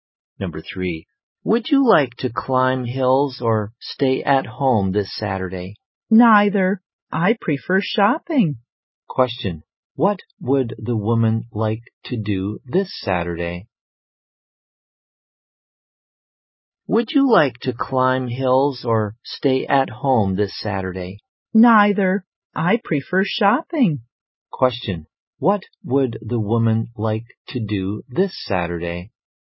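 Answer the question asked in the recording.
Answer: Go shopping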